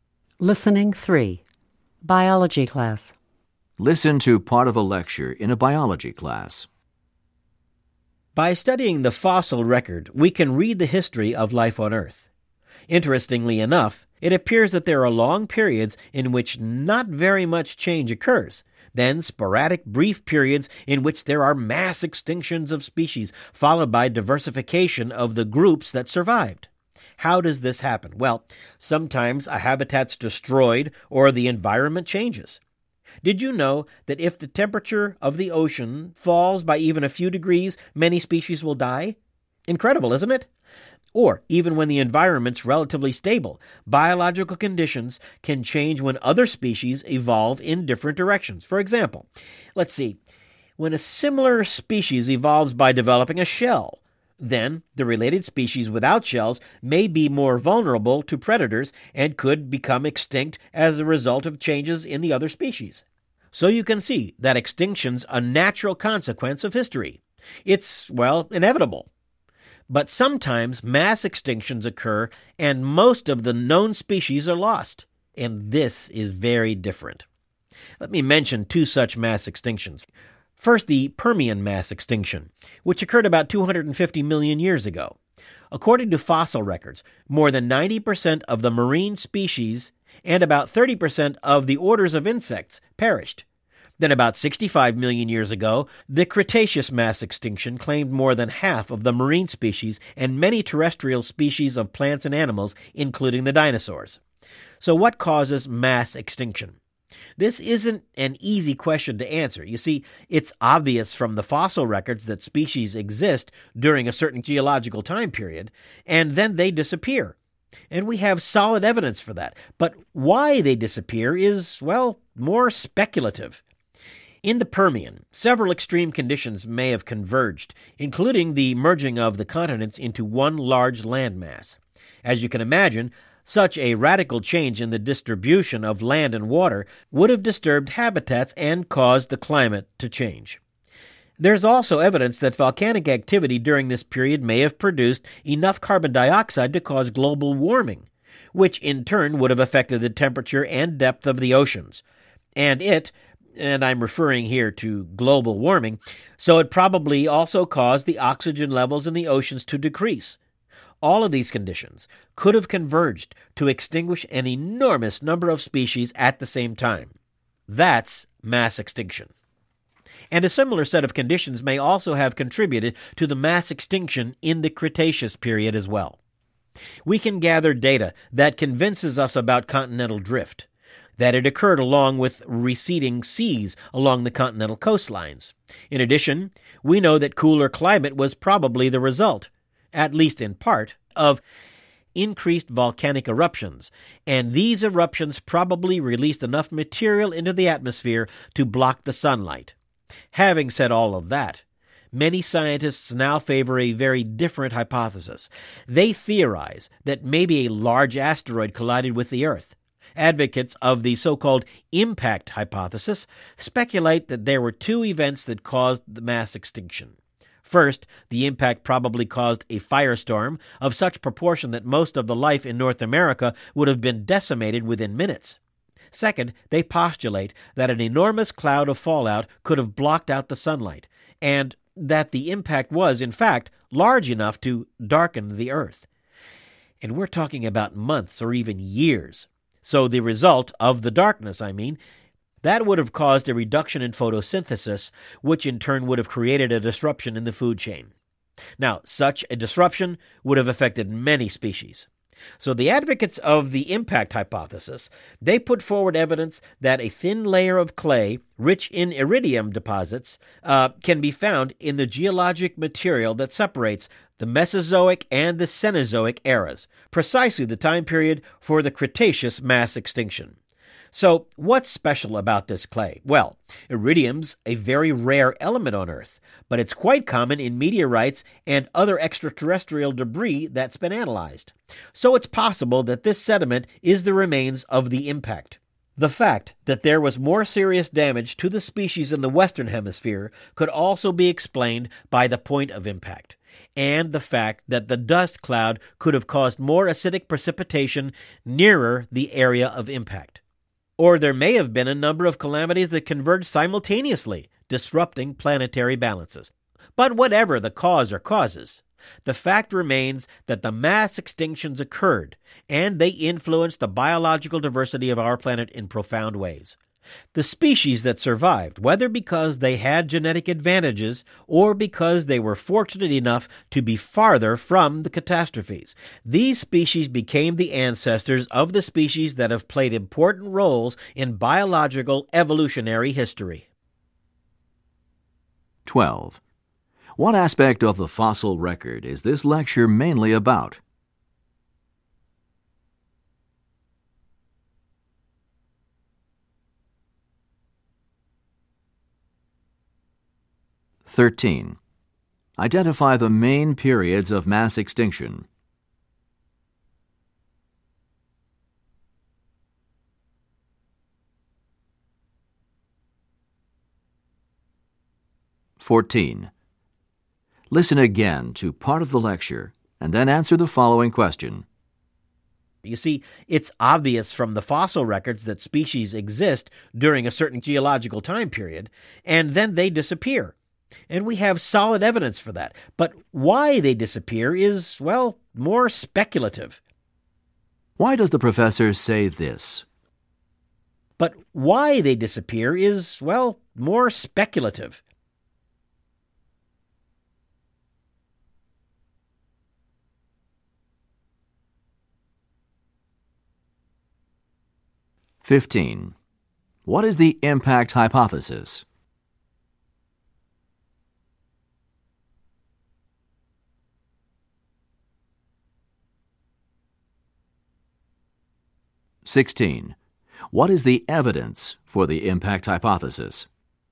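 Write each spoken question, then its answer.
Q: What aspect of the fossil record is this lecture mainly about?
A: Mass extinctions

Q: Identify the main periods of mass extinction.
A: The Permian and the Cretaceous

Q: What is the impact hypothesis?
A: A large asteroid collided with the Earth, causing mass extinction

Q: What is the evidence for the impact hypothesis?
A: A thin layer of clay rich in iridium at the Mesozoic-Cenozoic boundary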